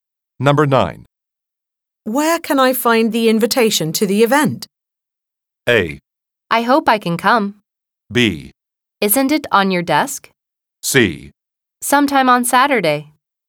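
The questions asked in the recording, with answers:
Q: Where can I find the invitation to the event?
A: B: Isn't it on your desk?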